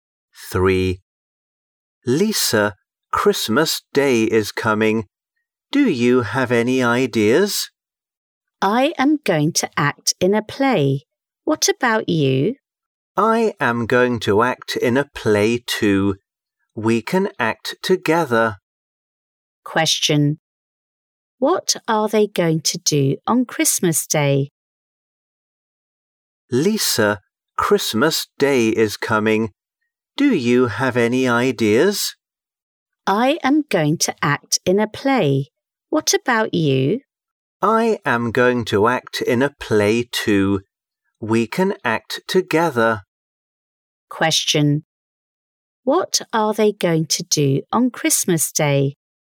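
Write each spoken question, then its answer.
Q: What are they going to do on Christmas Day?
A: Act in a play.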